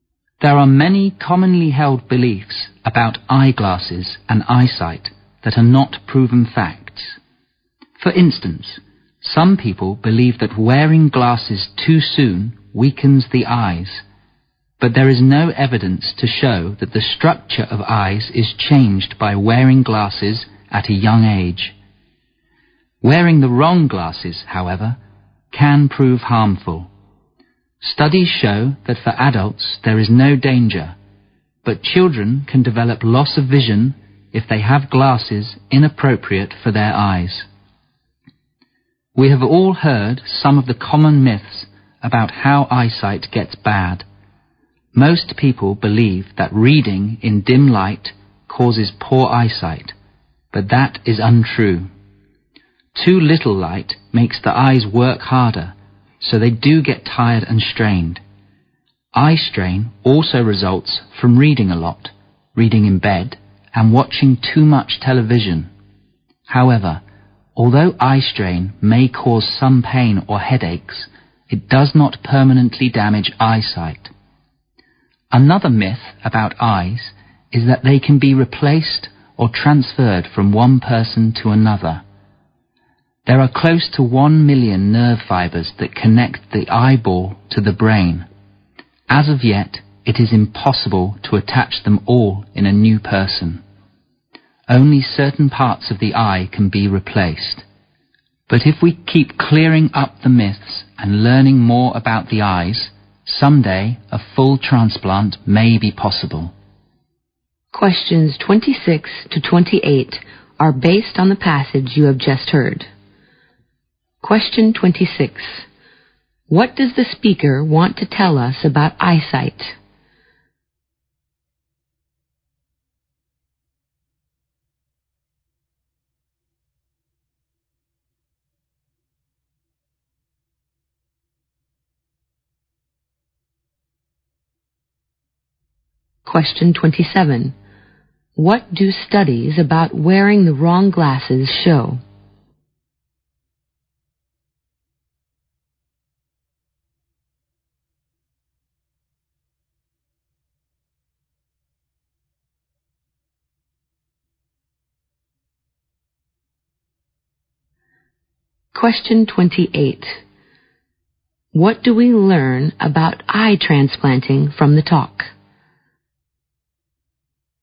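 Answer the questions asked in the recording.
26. Many common beliefs about eyeglasses and eyesight are myths, not proven facts.
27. They can harm children's vision but pose no danger to adults.
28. Only certain parts of the eye can be replaced for now; a full transplant isn't possible yet.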